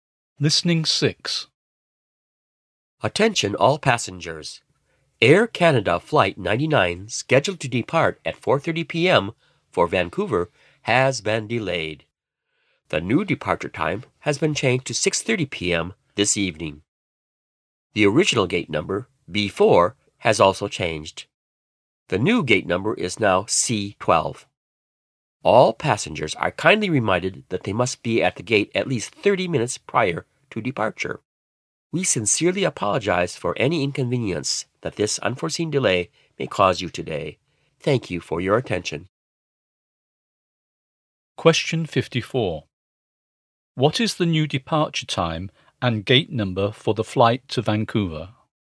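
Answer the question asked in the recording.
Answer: 6:30 p.m., gate C12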